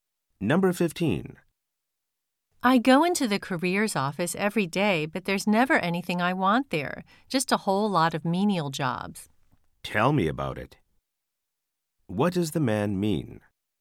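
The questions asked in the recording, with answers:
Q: What does the man mean?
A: He agrees; he also finds only menial jobs there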